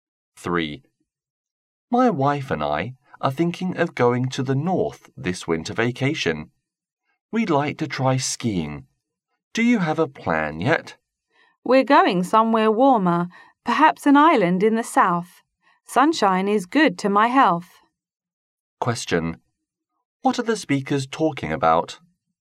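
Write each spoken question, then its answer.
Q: What are the speakers talking about?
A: Their plans for the winter vacation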